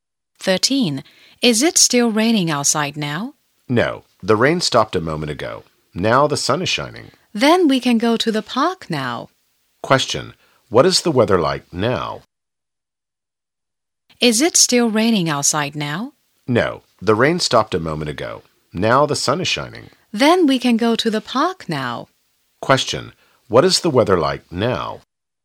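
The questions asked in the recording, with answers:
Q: What is the weather like now?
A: Sunny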